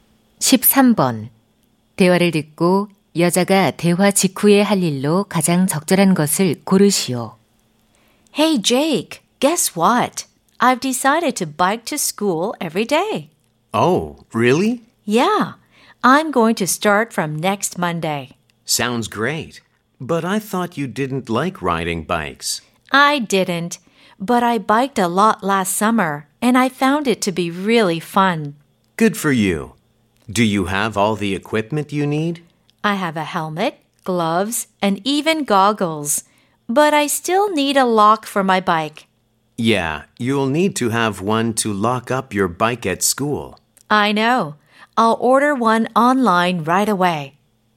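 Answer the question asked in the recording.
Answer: 온라인으로 자전거 자물쇠 주문하기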